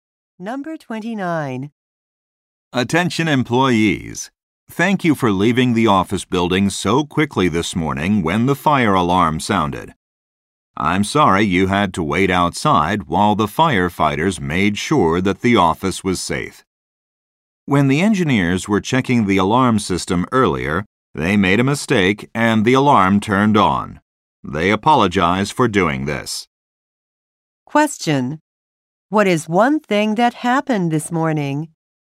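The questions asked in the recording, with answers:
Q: What is one thing that happened this morning?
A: Engineers accidentally set off the fire alarm.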